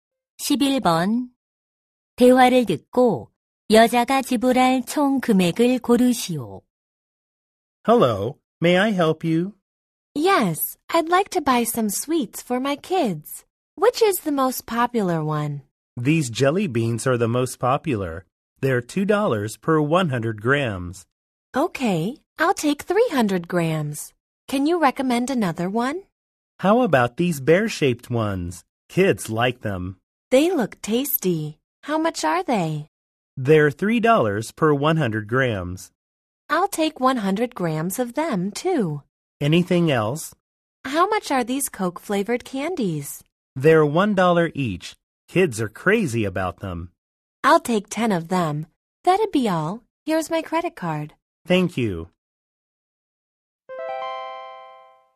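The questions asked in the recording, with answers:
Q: 대화를 듣고 여자가 지불할 총 금액을 고르시오.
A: $19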